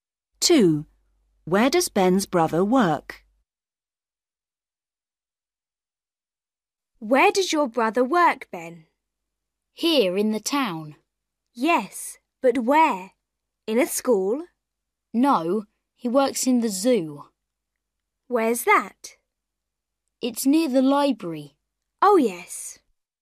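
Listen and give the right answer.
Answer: in the zoo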